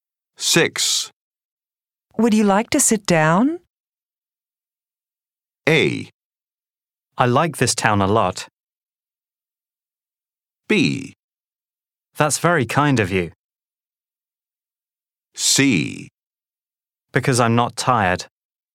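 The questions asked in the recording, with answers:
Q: Would you like to sit down?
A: B: That's very kind of you.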